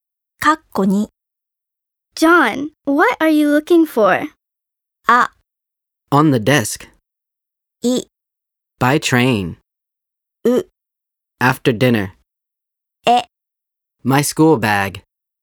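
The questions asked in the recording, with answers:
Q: John, what are you looking for?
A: え: My school bag.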